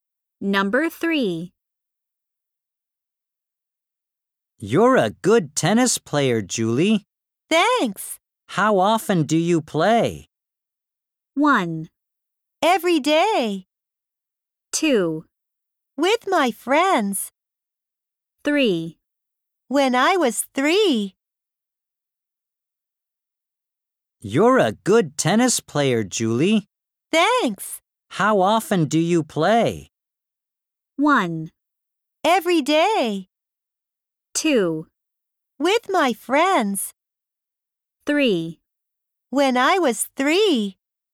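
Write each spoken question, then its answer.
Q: How often do you play?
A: 1: Every day.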